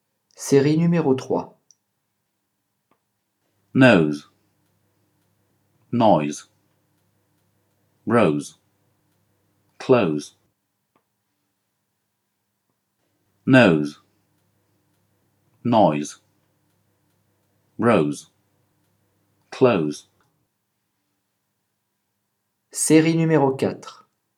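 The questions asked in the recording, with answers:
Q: Série numéro 3.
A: Noise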